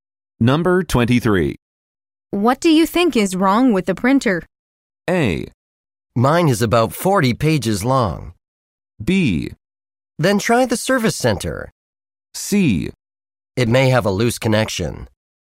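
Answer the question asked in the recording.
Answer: C: It may have a loose connection.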